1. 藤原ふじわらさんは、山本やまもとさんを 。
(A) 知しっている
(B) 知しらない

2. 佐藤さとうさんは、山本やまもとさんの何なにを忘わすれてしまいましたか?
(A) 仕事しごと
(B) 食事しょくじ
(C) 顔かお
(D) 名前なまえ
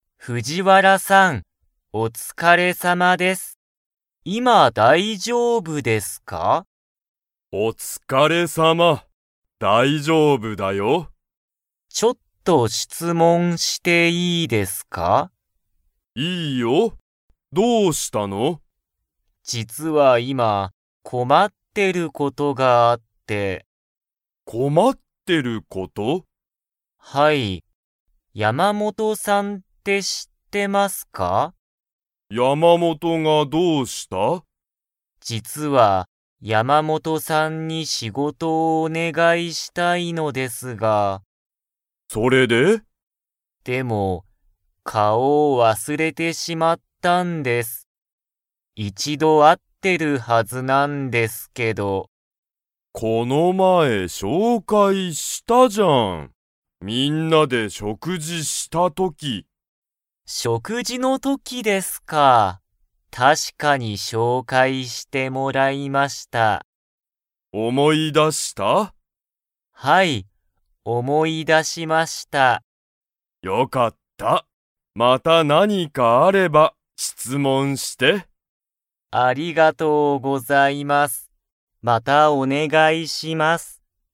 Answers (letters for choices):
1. A
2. C

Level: Level 3